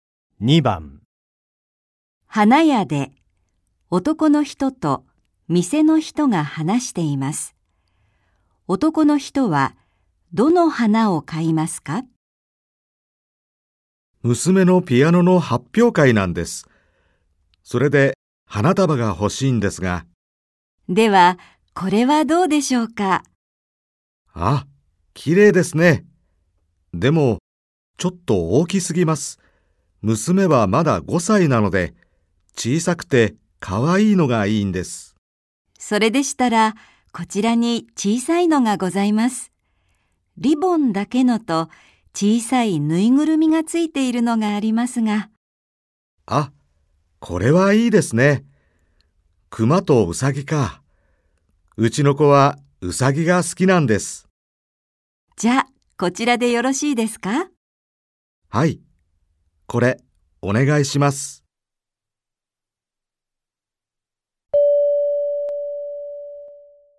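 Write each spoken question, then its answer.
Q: 男の人はどの花を買いますか?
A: ウサギのぬいぐるみがついている小さい花束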